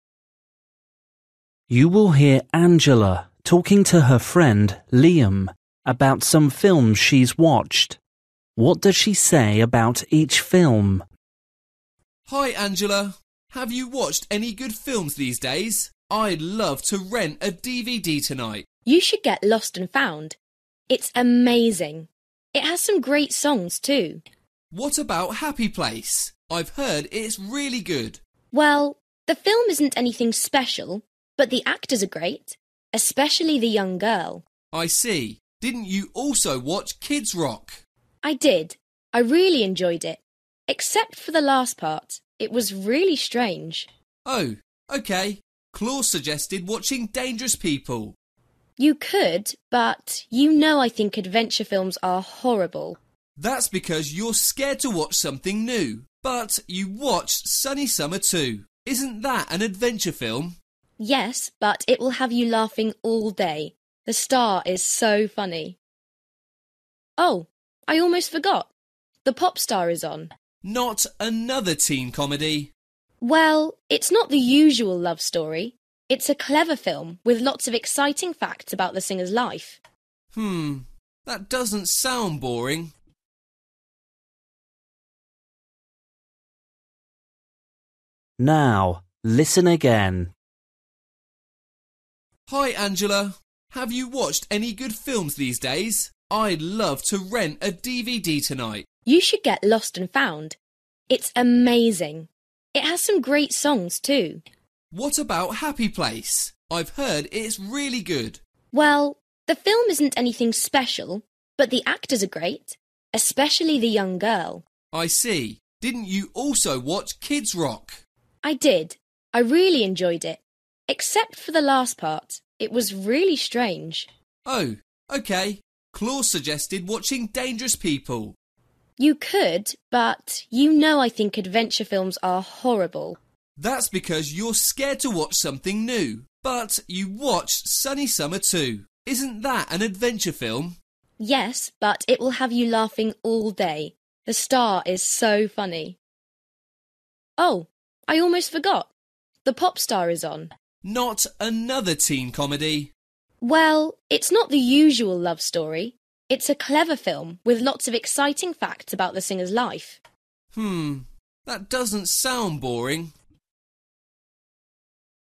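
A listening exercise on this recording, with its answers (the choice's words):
For each question, choose the correct answer.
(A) interesting story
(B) terrible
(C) good acting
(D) good music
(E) unusual ending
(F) scary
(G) boring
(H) funny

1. Happy Place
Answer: good acting

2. Kids Rock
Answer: unusual ending

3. Dangerous People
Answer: terrible

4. Sunny Summer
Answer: funny

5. Pop star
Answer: interesting story

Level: Luyện nghe trình độ A2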